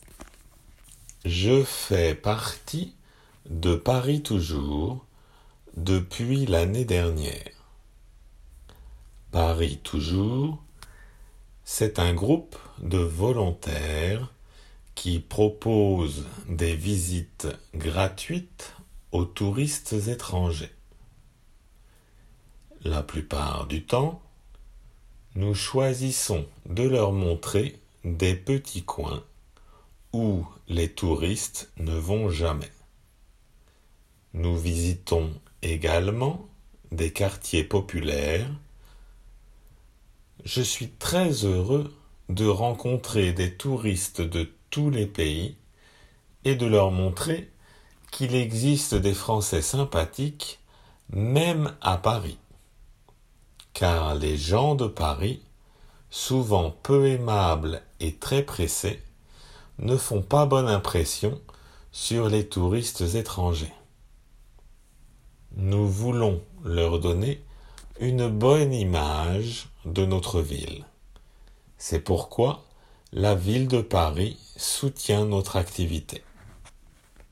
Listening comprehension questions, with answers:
Écoutez bien et indiquez si les phrases suivantes sont vraies ou fausses.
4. Jean veut améliorer l'image de Paris.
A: 〇

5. La ville de Paris aide ≪ Paris toujours ≫.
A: 〇

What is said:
≪Paris toujours≫
Je fais partie de ≪Paris toujours≫ depuis l'année dernière. ≪Paris toujours≫, c'est un groupe de volontaires qui propose des visites gratuites aux touristes étrangers. La plupart du temps, nous choisissons de leur montrer des petits coins où les touristes ne vont jamais. Nous visitons également des quartiers populaires. Je suis très heureux de rencontrer des touristes de tous les pays et de leur montrer qu'il existe des Français sympathiques même à Paris, Car les gens de Paris souvent peu aimables et très pressés, ne font pas bonne impression sur les touristes étrangers. Nous voulons leur donner une bonne image de notre ville c'est pourquoi la ville de Paris soutient notre activité.